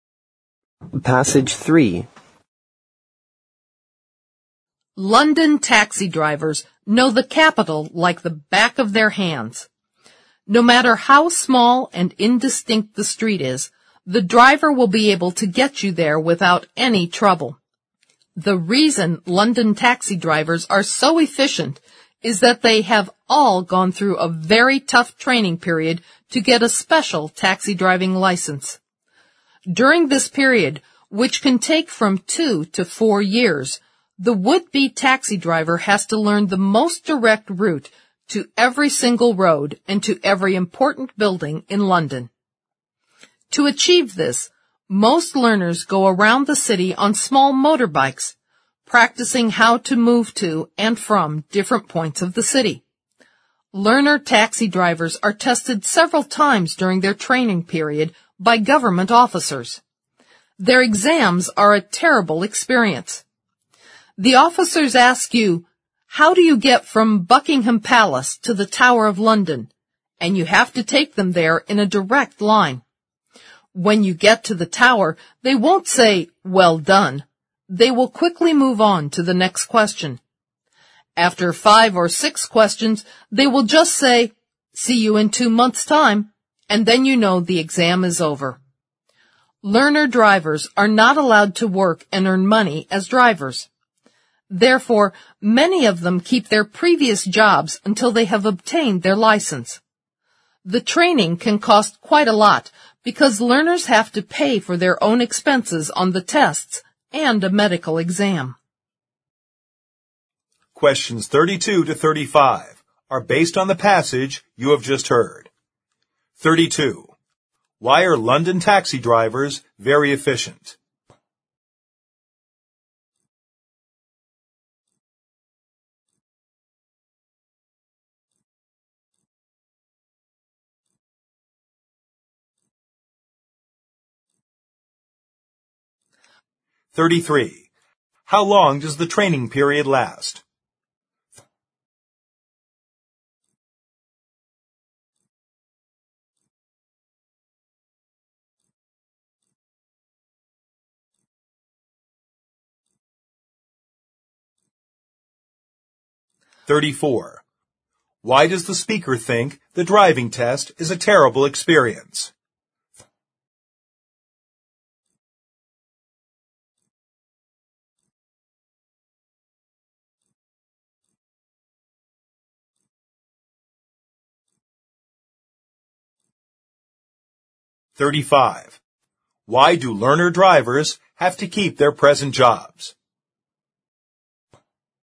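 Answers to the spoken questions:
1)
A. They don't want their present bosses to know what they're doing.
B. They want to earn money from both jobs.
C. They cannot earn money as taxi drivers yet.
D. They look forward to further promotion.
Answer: C. They cannot earn money as taxi drivers yet.
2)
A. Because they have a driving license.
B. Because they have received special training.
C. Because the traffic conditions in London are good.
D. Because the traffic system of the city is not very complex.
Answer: B. Because they have received special training.
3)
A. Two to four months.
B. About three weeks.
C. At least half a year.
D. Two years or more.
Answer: D. Two years or more.
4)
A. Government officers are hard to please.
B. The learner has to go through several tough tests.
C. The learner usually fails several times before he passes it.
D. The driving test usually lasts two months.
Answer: B. 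The learner has to go through several tough tests.

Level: 四级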